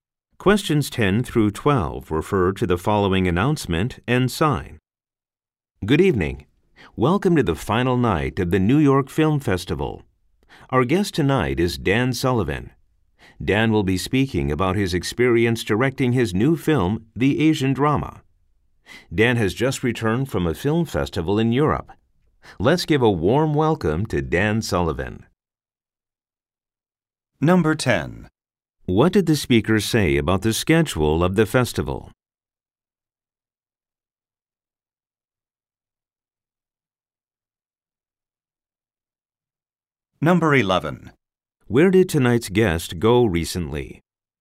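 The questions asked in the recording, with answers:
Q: What did the speaker say about the schedule of the festival?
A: It is the final night of the festival

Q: Where did tonight's guest go recently?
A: To a film festival in Europe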